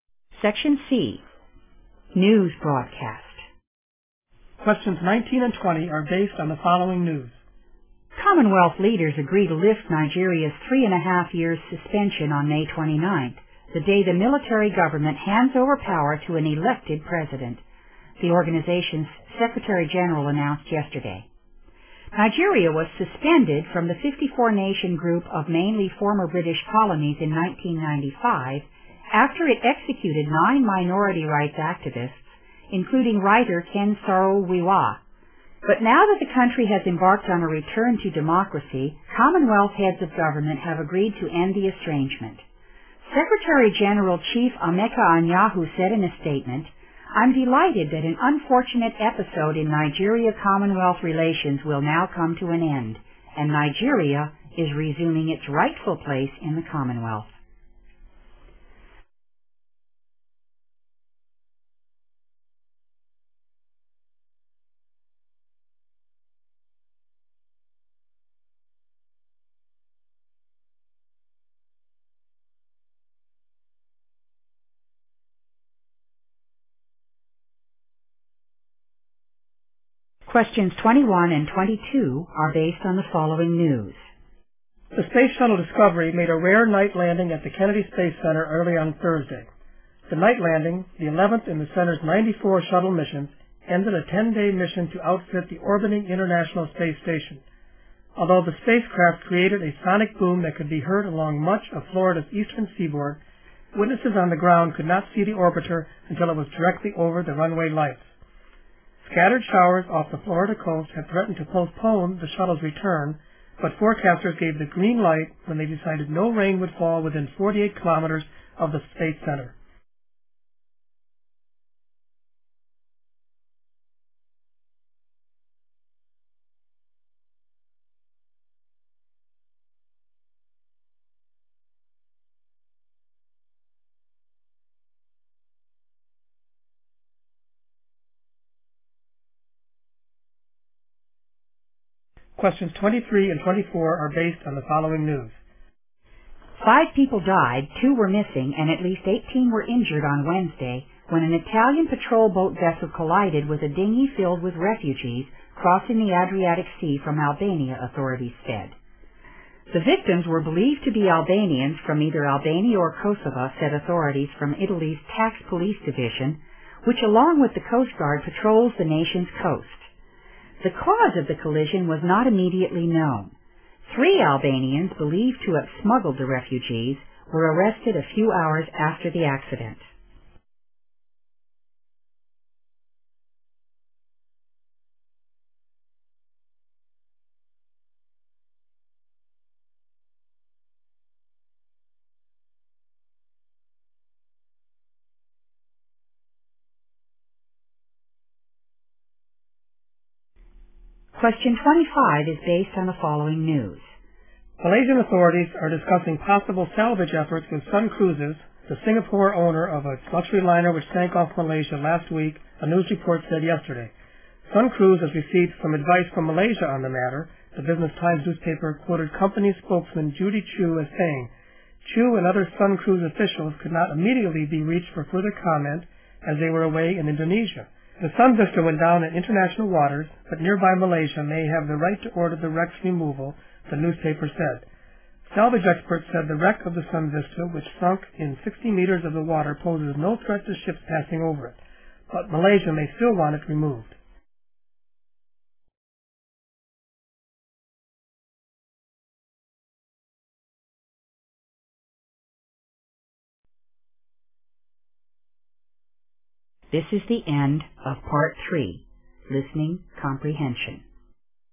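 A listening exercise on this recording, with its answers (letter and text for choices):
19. Nigeria returned to the Commonwealth after ___.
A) she had sentenced minority rights activists to death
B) the military had resumed control of the country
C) power had been handed over to an elected president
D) she had negotiated with Commonwealth leaders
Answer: C) power had been handed over to an elected president

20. The Commonwealth consists of ___countries which were former British colonies.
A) 54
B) 29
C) 9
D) 95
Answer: A) 54

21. The space shuttle Discovery completed a ___mission upon to the Kennedy Space Centre.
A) 11-day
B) 94-day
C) 10-day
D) 49-day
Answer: C) 10-day

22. When the spacecraft was going to land, ___.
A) it produced a lot of noise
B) there were scattered showers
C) people could see it high in the sky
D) people could neither see nor hear it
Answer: A) it produced a lot of noise

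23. How many people died during the collision?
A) Two.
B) Eighteen.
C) Three.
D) Five.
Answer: D) Five.

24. Three Albanians were arrested for___.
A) attacking the patrol boat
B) smuggling in refugees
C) causing the accident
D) injuring refugees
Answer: B) smuggling in refugees

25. The news item is mainly about___.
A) efforts to salvage Sun Vista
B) negotiation with the ship's owner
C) threats Sun Vista poses to passing ships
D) a newspaper's comment on Sun Vista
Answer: A) efforts to salvage Sun Vista

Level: 英语专业四级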